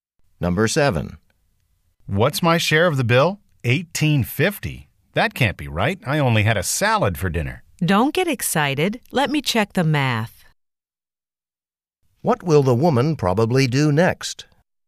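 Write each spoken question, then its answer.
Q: What will the woman probably do next?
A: Check the math on the bill.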